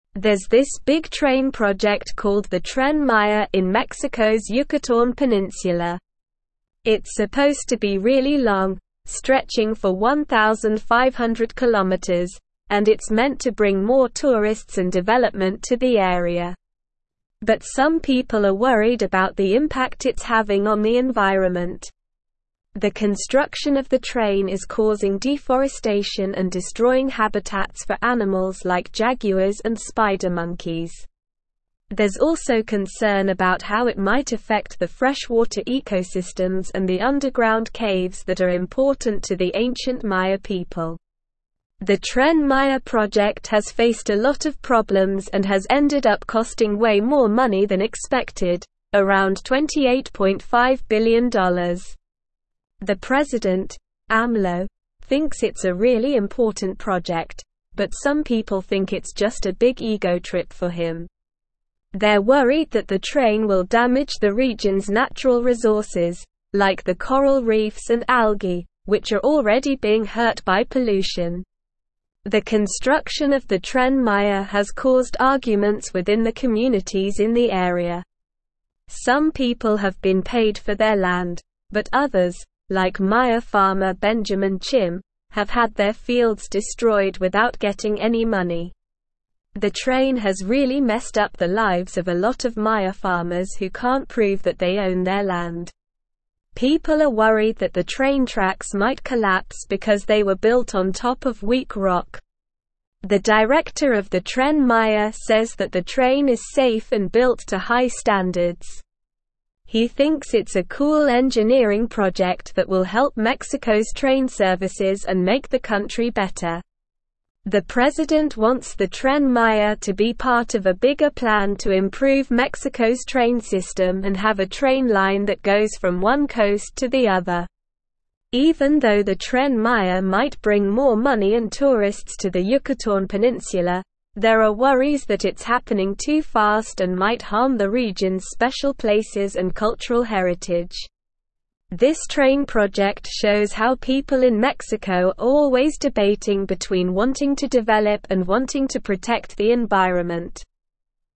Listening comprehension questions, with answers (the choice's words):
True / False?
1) The Tren Maya is a large train project in Mexico's Yucatán Peninsula that aims to bring more tourists and development to the area.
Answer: True

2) The project has encountered minimal issues and has not resulted in excessive costs compared to the initial estimation, approximately $28.5 billion.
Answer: False

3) Concerns have been raised about the stability of the train tracks, as they were built on top of weak rock.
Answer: True

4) The train's impact on the region's natural resources, such as coral reefs and algae, is not a concern despite existing pollution.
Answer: False

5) The construction of the train has not caused any disputes within the local communities, with everyone being fairly compensated for their land.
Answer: False

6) The president sees the Tren Maya as part of a larger plan to improve Mexico's train system and create a coast-to-coast train line.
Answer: True

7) Concerns have been raised about the environmental impact of the train's construction, including deforestation and destruction of habitats for animals like jaguars and spider monkeys.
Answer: True

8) Most people agree that the Tren Maya is crucial for the region and not just an indulgence for the president, Amlo.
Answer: False

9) What is the purpose of the Tren Maya project?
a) To protect the environment and wildlife in the area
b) To improve Mexico's train system nationwide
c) To bring more tourists and development to the Yucatán Peninsula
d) To preserve the cultural heritage of the ancient Maya people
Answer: To bring more tourists and development to the Yucatán Peninsula

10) What is one concern about the construction of the Tren Maya?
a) Increased pollution in the Yucatán Peninsula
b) Damage to the coral reefs and algae in the region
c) Collapse of the train tracks due to weak rock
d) Deforestation and destruction of animal habitats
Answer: Deforestation and destruction of animal habitats

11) How much money has the Tren Maya project cost so far?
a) $1 million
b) $100,000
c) $10 billion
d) $28.5 billion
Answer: $28.5 billion

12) What is one criticism of the Tren Maya project?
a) It is not being built to high safety standards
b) It will not bring any economic benefits to the region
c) Some people believe it is a vanity project for the president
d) The train tracks were not built on top of weak rock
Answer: Some people believe it is a vanity project for the president

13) How has the Tren Maya project affected Maya farmers?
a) Some farmers have been paid for their land, while others have not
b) The project has improved the livelihoods of all Maya farmers in the area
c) Maya farmers have been given alternative land to continue farming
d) The train tracks have destroyed the fields of all Maya farmers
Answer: Some farmers have been paid for their land, while others have not

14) What is the director of the Tren Maya's opinion on the project?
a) He thinks the project is a waste of money and resources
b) He believes the train is safe and built to high standards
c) He is concerned about the impact on the environment and wildlife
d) He believes the train will not bring any benefits to Mexico's train system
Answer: He believes the train is safe and built to high standards

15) What is one potential benefit of the Tren Maya project?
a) Preservation of the region's natural resources and cultural heritage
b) Increased tourism and economic growth in the Yucatán Peninsula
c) Improved train services throughout Mexico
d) Protection of the environment and wildlife in the area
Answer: Increased tourism and economic growth in the Yucatán Peninsula

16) What does the Tren Maya project highlight about Mexico?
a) The ongoing debate between development and environmental protection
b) The lack of infrastructure and transportation options in the country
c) The government's disregard for the concerns of local communities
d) The importance of preserving the cultural heritage of the ancient Maya people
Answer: The ongoing debate between development and environmental protection

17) it's meant to (1)______ more (2)______ and development to the area.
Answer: bring

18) it's meant to (1)______ more (2)______ and development to the area.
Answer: tourists

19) But some people are worried about the (3)______ it's having on the environment.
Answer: impact

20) The construction of the train is causing deforestation and destroying habitats for animals like jaguars and (4)______ monkeys.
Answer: spider

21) The Tren Maya project has faced a lot of problems and has (5)______ up costing way more money than expected, around $28.5 billion.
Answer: ended

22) They're worried that the (7)______ will damage the region's natural resources, like the coral reefs and (8)______, which are already being hurt by pollution.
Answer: train

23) They're worried that the (7)______ will damage the region's natural resources, like the coral reefs and (8)______, which are already being hurt by pollution.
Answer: algae

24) Some people have been paid for their land, but others, like Maya (9)______ Benjamin Chim, have had their fields (10)______ without getting any money.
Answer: farmer

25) Some people have been paid for their land, but others, like Maya (9)______ Benjamin Chim, have had their fields (10)______ without getting any money.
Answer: destroyed

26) The train has really (11)______ up the lives of a lot of Maya farmers who can't prove that they own their land.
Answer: messed

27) People are worried that the train (12)______ might collapse because they were built on top of weak rock.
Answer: tracks

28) This train project shows how people in Mexico are always (13)______ between (14)______ to (15)______ and wanting to (16)______ the environment.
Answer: debating

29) This train project shows how people in Mexico are always (13)______ between (14)______ to (15)______ and wanting to (16)______ the environment.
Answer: develop

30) This train project shows how people in Mexico are always (13)______ between (14)______ to (15)______ and wanting to (16)______ the environment.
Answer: protect

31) What is the purpose of the Tren Maya project in Mexico's Yucatán Peninsula?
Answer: The purpose of the Tren Maya project is to bring more tourists and development to the area.

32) What environmental concerns are associated with the construction of the train?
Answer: The construction of the train is causing deforestation, destroying habitats for animals like jaguars and spider monkeys, and there are concerns about its impact on freshwater ecosystems and underground caves important to the ancient Maya people.

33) How do some people view the president's involvement in the Tren Maya project?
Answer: Some people view the president's involvement in the Tren Maya project as a big ego trip for him.

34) How has the construction of the train affected the lives of Maya farmers?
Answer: The construction of the train has affected the lives of Maya farmers by destroying their fields without compensation, especially for those who cannot prove ownership of their land.

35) What concerns are there about the stability of the train tracks?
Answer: There are concerns that the train tracks might collapse because they were built on top of weak rock.

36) What is the director's opinion of the Tren Maya project?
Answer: The director of the Tren Maya project thinks it is a cool engineering project that will help improve Mexico's train services and make the country better.

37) What are the conflicting views regarding the impact of the Tren Maya project on the region's special places and cultural heritage?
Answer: There are conflicting views regarding the impact of the Tren Maya project on the region's special places and cultural heritage, with some believing it might harm these aspects due to its fast pace of construction, while others believe it will bring more money and tourists to the area.

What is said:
There's this big train project called the Tren Maya in Mexico's Yucatán Peninsula. It's supposed to be really long, stretching for 1,500km, and it's meant to bring more tourists and development to the area. But some people are worried about the impact it's having on the environment. The construction of the train is causing deforestation and destroying habitats for animals like jaguars and spider monkeys. There's also concern about how it might affect the freshwater ecosystems and the underground caves that are important to the ancient Maya people.
The Tren Maya project has faced a lot of problems and has ended up costing way more money than expected, around $28.5 billion. The president, Amlo, thinks it's a really important project, but some people think it's just a big ego trip for him. They're worried that the train will damage the region's natural resources, like the coral reefs and algae, which are already being hurt by pollution.
The construction of the Tren Maya has caused arguments within the communities in the area. Some people have been paid for their land, but others, like Maya farmer Benjamin Chim, have had their fields destroyed without getting any money. The train has really messed up the lives of a lot of Maya farmers who can't prove that they own their land. People are worried that the train tracks might collapse because they were built on top of weak rock.
The director of the Tren Maya says that the train is safe and built to high standards. He thinks it's a cool engineering project that will help Mexico's train services and make the country better. The president wants the Tren Maya to be part of a bigger plan to improve Mexico's train system and have a train line that goes from one coast to the other.
Even though the Tren Maya might bring more money and tourists to the Yucatán Peninsula, there are worries that it's happening too fast and might harm the region's special places and cultural heritage. This train project shows how people in Mexico are always debating between wanting to develop and wanting to protect the environment.

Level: Level 3